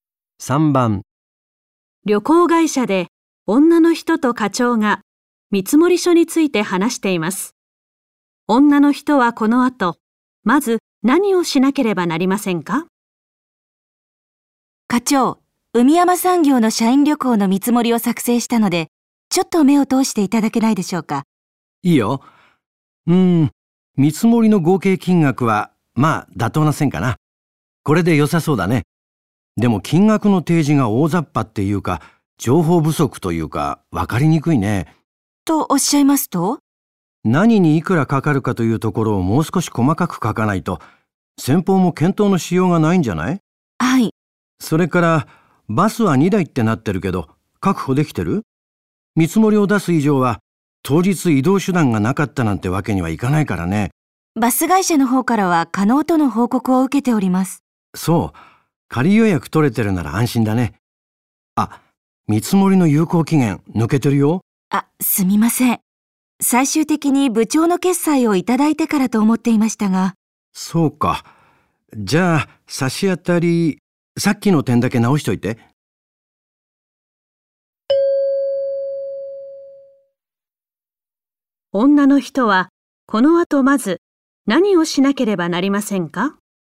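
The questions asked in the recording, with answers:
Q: 女の人はこの後まず何をしなければなりませんか?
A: 見積書に何にいくらかかるか細かく書く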